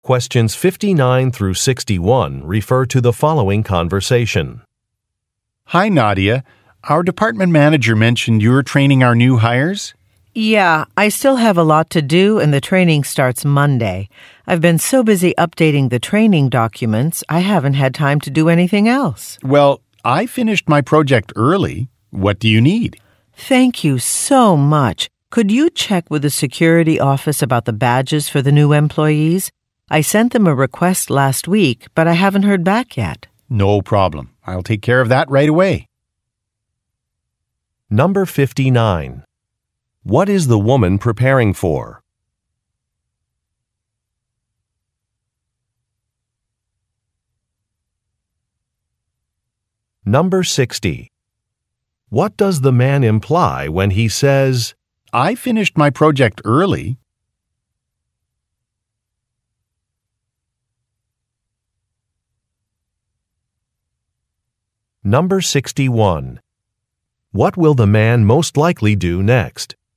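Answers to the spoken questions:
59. A training session for new employees
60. He is available to help
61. Contact the security office about badges for the new employees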